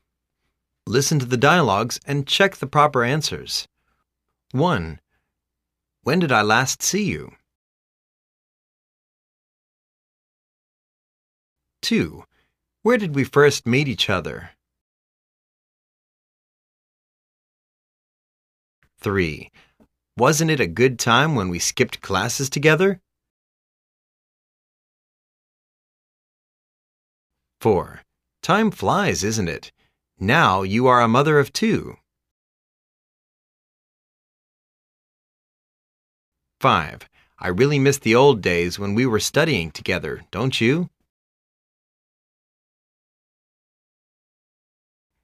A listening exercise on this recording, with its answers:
Listen to the dialogues and check the proper answers.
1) When did I last see you?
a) About two years ago.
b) In a cafe.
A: a) About two years ago.

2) Where did we first meet each other?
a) I hardly remember.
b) I didn't know your name.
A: a) I hardly remember.

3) Wasn't it a good time when we skipped classes together?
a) Yes. I still remember we were out together to the Ai-Mei Mountain.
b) Yes. I don't remember whether we had done such things.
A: a) Yes. I still remember we were out together to the Ai-Mei Mountain.

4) Time flies, isn't it? Now you are a mother of two.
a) Yes. Time flies so quickly. Now, your child is about 7 years old!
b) Yes. I don't know what time it is.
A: a) Yes. Time flies so quickly. Now, your child is about 7 years old!

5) I really miss the old days when we were studying together.Don't youl?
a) Me too. I hate the time when we were studying at school.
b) Me too. I wish we could turn back the time again.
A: b) Me too. I wish we could turn back the time again.

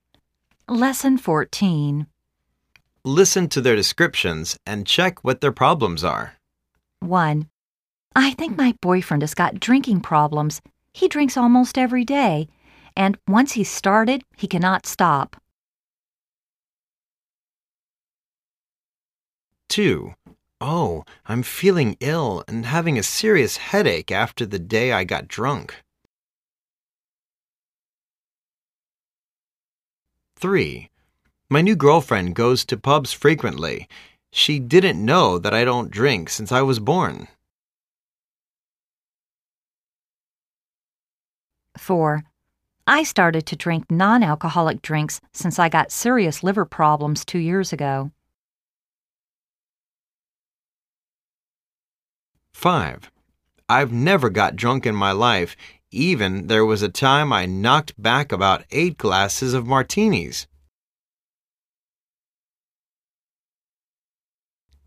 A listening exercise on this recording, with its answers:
Listen to their descriptions and check what their problems are.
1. Her boyfriend is...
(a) a teetotaler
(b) a hangover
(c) a drunk driver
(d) an alcoholic.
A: (d) an alcoholic.

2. She has got...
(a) a headache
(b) a stomachache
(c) a hangover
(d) a jetlag.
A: (c) a hangover

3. He is...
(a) a bartender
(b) a teetotaler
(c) an alcoholic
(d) a liar.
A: (b) a teetotaler

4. He has...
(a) stopped drinking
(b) drunk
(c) drinking and driving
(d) getting drunk for two years.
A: (a) stopped drinking

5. He is able to...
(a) hold his drink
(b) drink and drive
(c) get drunk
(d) give up drinking.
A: (a) hold his drink

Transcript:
1.I think my boyfriend has got drinking problems,he drinks almost every day.And,once he started he cannot stop!
2.Oh...I'm feeling ill and having a serious headache after the day I got drunk.
3.My new girlfriend goes to pubs frequently.She didn't know that I don't drink since I was born.
4.I started to drink non-alcoholic drinks since I got serious liver problems two years ago.
5.I never got drunk in my life even there was a time I knocked back about 8 glasses of Martines.

